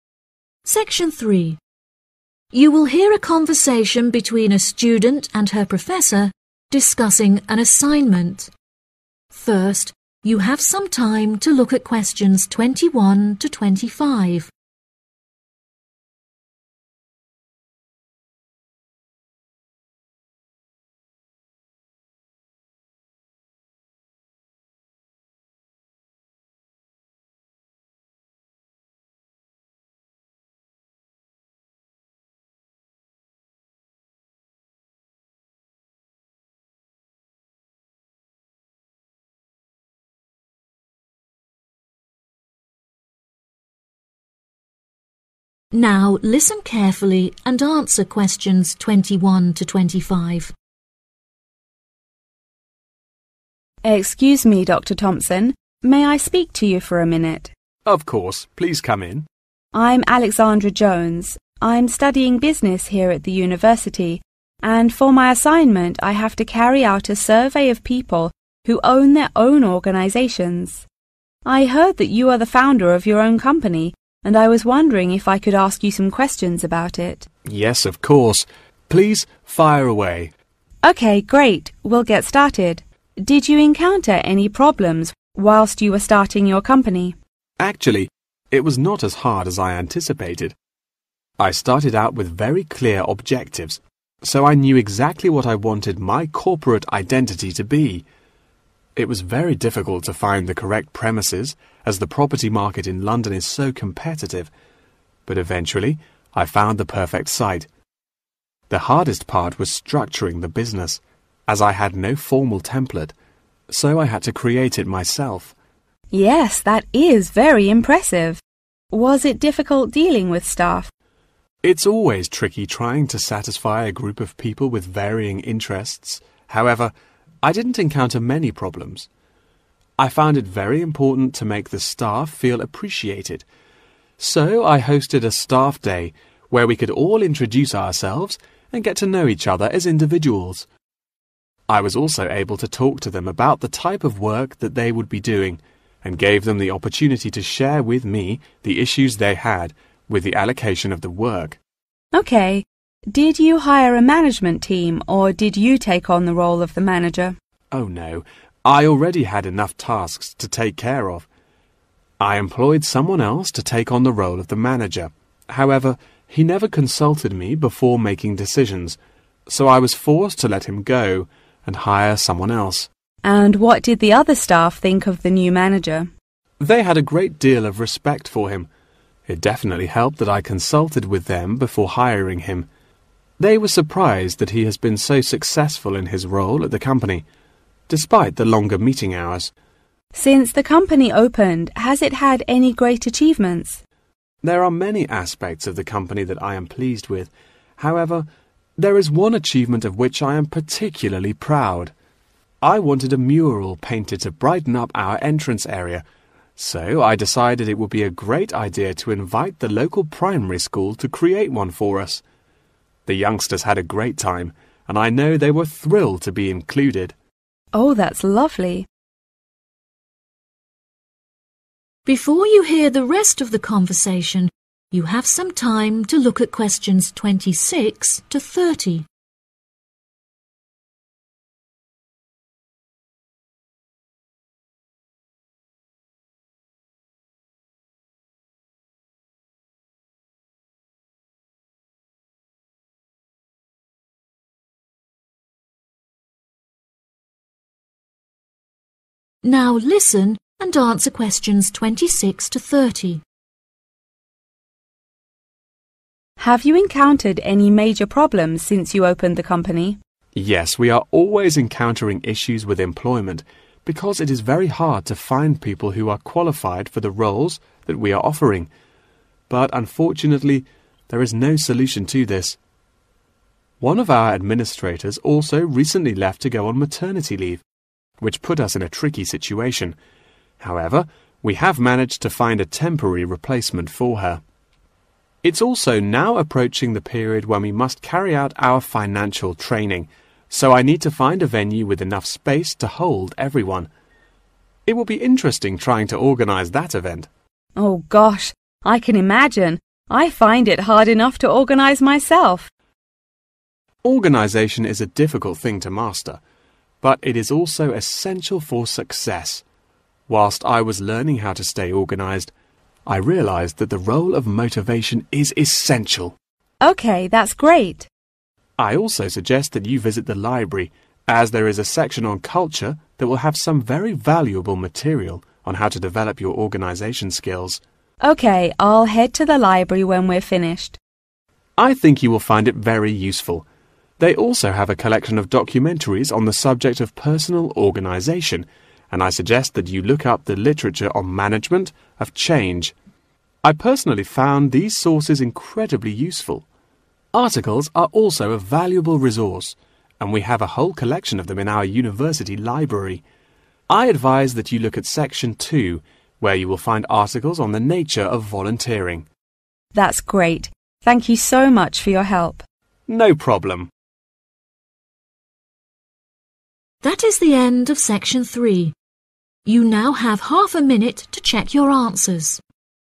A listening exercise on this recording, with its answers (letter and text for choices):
Choose the correct letter, A, B or C.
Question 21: What was the most difficult problem when the company was founded?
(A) No clear objectives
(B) No formal structures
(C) No perfect premises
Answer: (B) No formal structures

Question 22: What is the staff unsatisfied with?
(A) The type of work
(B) The work assignment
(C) The feeling of appreciation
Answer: (B) The work assignment

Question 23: What was the problem of the manager?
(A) He had a lot of tasks to do.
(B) He employed too many people and let them go then.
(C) He always made decisions by himself.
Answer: (C) He always made decisions by himself.

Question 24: What does the staff think of the new manager of the company?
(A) They are delighted to see that the meeting time is shorter.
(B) They feel annoyed toward him.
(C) They are amazed that he has done it well.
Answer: (C) They are amazed that he has done it well.

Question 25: What achievement has the organisation made already?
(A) Children were involved in painting the entrance area.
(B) There was no particular achievement.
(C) It built a local primary school.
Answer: (A) Children were involved in painting the entrance area.

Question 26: Since the company opened, there have been many problems with employment, but there is no 26..............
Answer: solution

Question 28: To enhance the organisation skills, there is a section on 28.............. in the library where some valuable books can be found.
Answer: culture

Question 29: the literature on 29..............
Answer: management of change

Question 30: and the articles on the 30..............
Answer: nature of volunteering